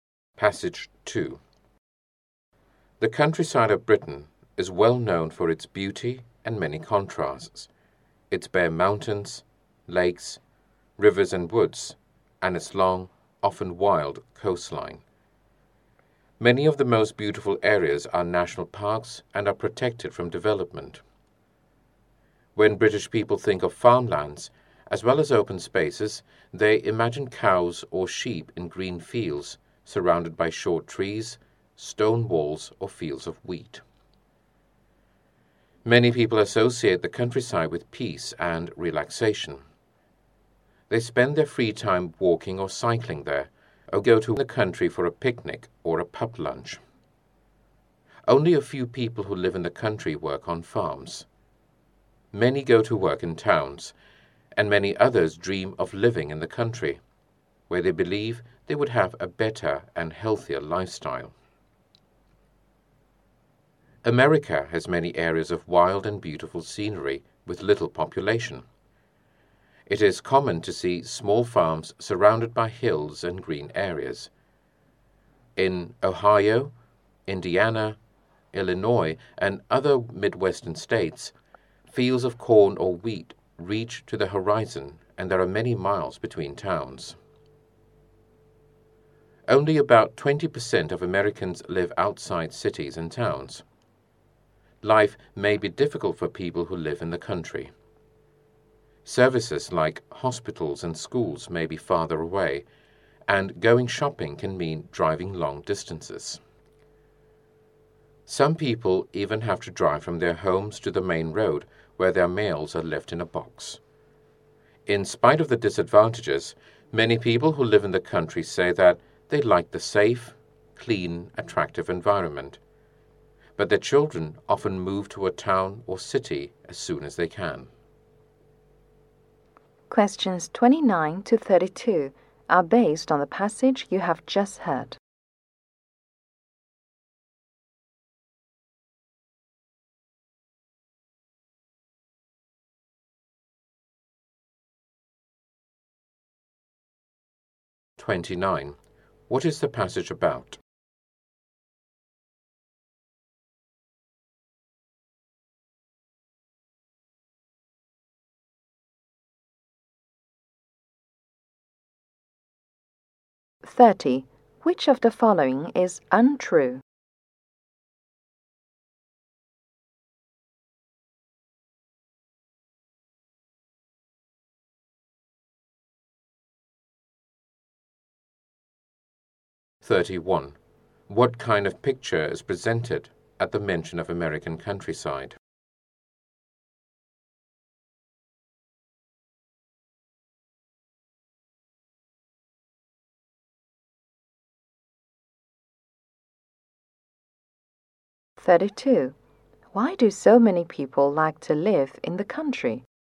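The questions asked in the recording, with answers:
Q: Why do so many people like to live in the country?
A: The safe, clean, attractive environment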